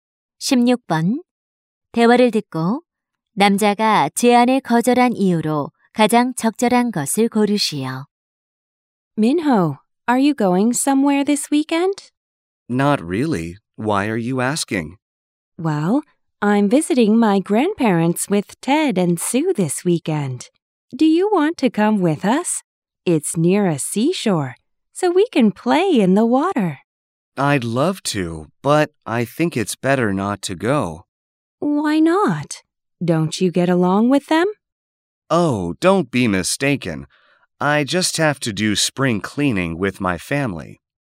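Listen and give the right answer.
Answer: 가족과 봄맞이 대청소를 해야 해서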